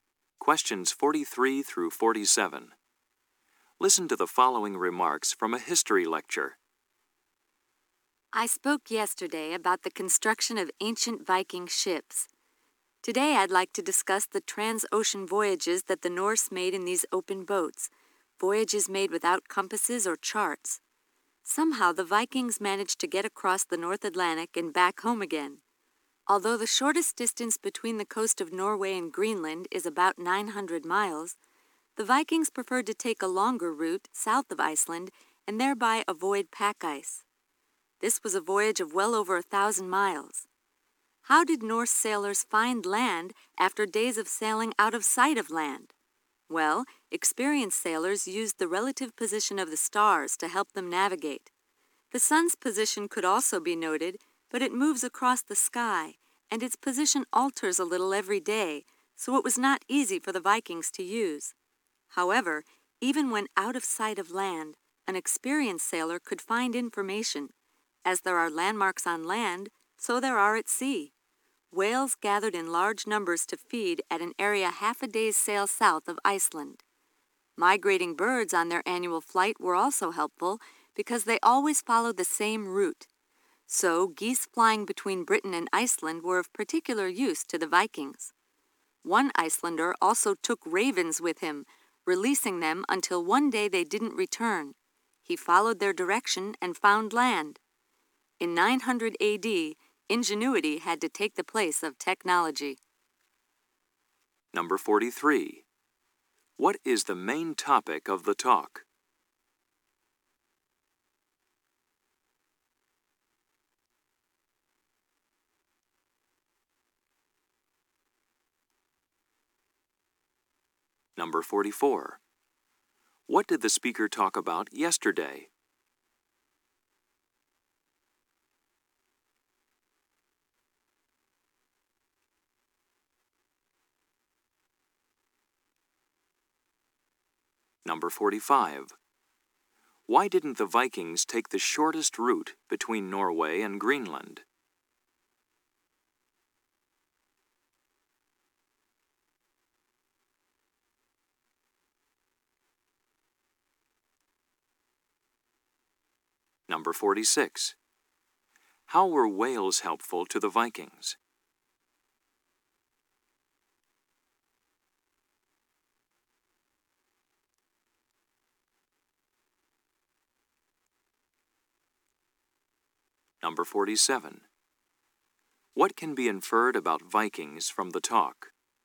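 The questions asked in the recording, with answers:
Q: What is the main topic of the talk?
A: How the Vikings navigated across the ocean

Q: What did the speaker talk about yesterday?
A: The construction of Viking ships

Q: Why didn't the Vikings take the shortest route between Norway and Greenland?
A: To avoid pack ice

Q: How were whales helpful to the Vikings?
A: They served as landmarks at sea, gathering south of Iceland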